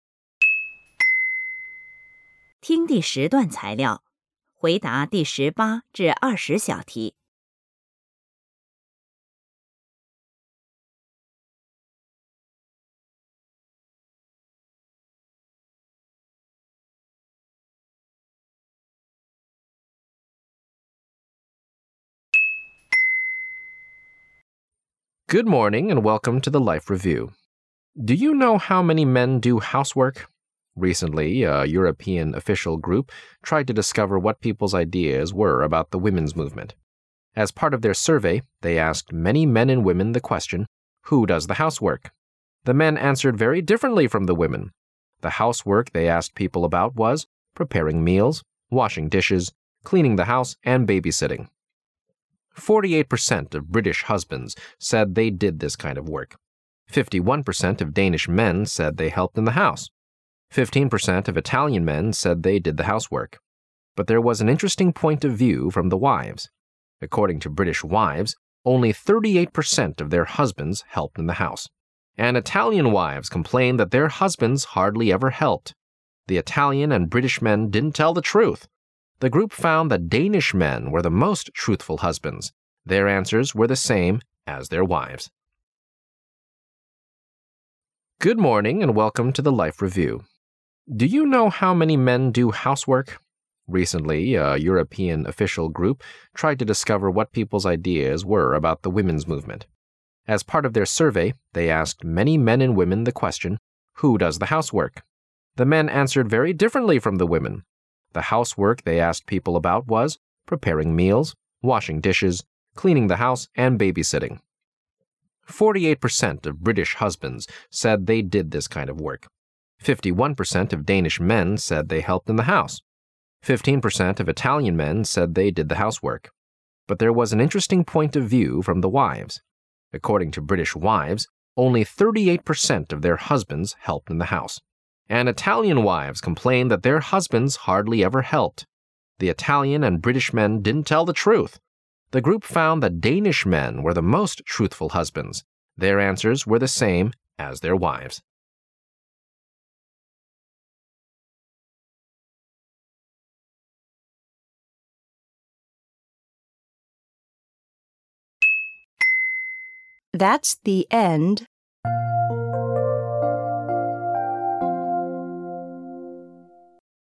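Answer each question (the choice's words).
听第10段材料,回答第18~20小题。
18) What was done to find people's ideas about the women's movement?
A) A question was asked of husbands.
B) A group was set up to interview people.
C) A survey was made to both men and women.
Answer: A survey was made to both men and women.

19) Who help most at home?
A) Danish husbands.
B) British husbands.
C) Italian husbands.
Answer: Danish husbands.

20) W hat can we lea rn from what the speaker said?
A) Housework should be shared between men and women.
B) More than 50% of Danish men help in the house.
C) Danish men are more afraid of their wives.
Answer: More than 50% of Danish men help in the house.

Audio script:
Good morning and welcome to the Life Review. Do you know how many men do housework? Recently, a European official group tried to discover what people's ideas were about the women's movement. As part of their survey , they asked many men and women the question, "Who does the housework?" The men answered very differently from the women! 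The housework they asked people about was: preparing meals, washing dishes, cleaning the house and baby sitting. 48% of British husbands said they did this kind of work. 51% of Danish men said they helped in the house. 15% of Italian men said they did the housework. But there was an interesting point of view from the wives. According to British wives, only 38% of their husbands helped in the house. And Italian wives complained that their husbands hardly ever helped. The Italian and British men didn't tell the truth! The group found that Danish men were the most truthful husbands. Their answers were the same as their wives'.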